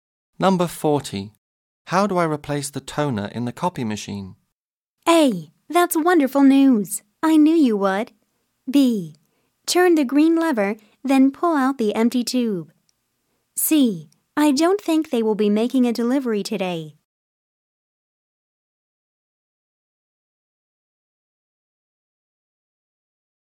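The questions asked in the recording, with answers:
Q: How do I replace the toner in the copy machine?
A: B: Turn the green lever, then pull out the empty tube.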